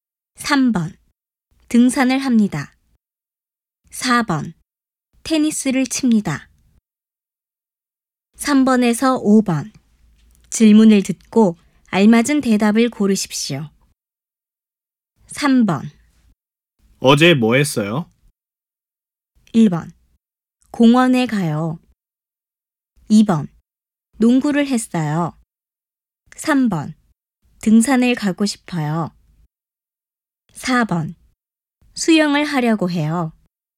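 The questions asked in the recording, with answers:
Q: 어제 뭐 했어요?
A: 2: 농구를 했어요.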